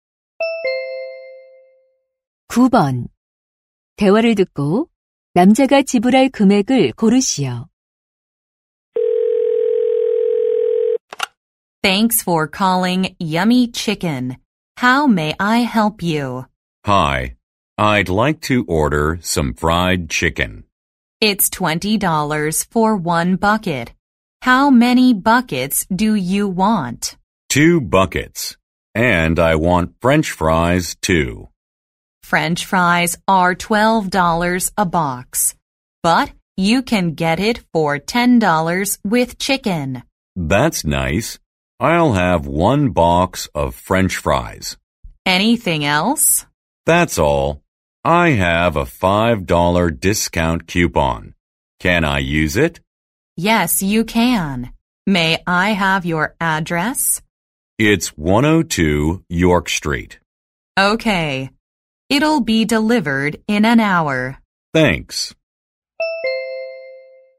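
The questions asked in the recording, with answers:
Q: 대화를 듣고 남자가 지불할 금액을 고르시오.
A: $45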